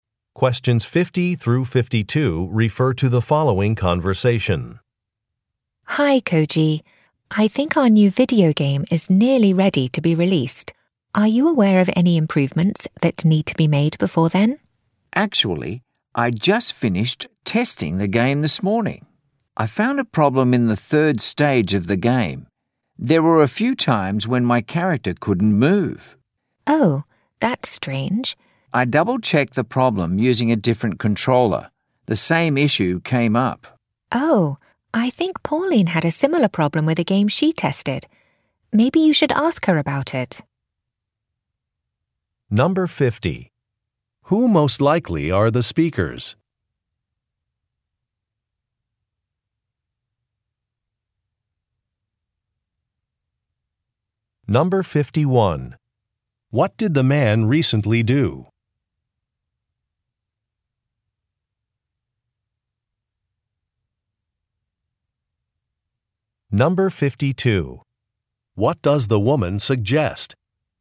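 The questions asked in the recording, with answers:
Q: Who most likely are the speakers?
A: Video game developers

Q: What did the man recently do?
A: He tested the game

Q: What does the woman suggest?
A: Asking Pauline about the problem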